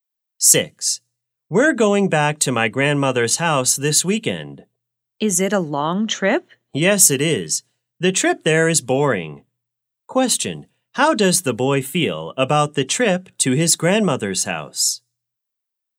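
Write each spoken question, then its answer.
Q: Question, how does the boy feel about the trip to his grandmother's house?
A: Bored; the trip is boring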